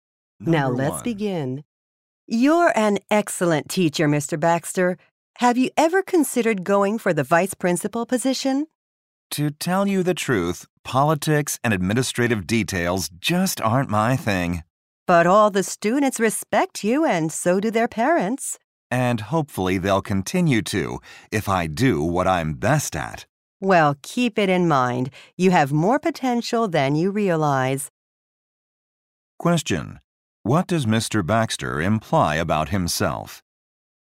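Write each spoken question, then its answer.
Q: What does Mr. Baxter imply about himself?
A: He prefers teaching to administrative work and is not interested in becoming vice principal.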